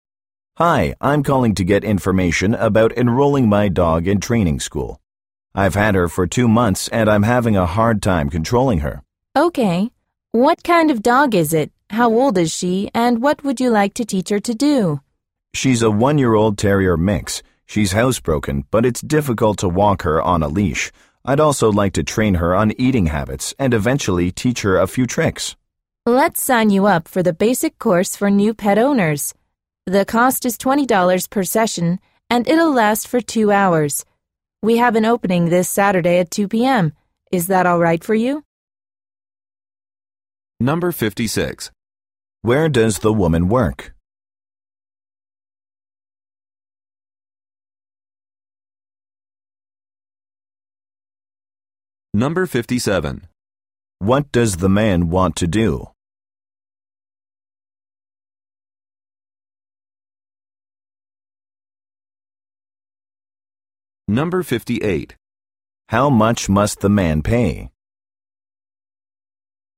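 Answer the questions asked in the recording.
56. At a dog training school
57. Enroll his dog in training school
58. $20 per session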